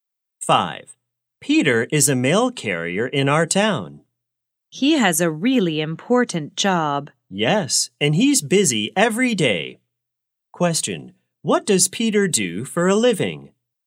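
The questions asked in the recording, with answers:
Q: What does Peter do for a living?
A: He is a mail carrier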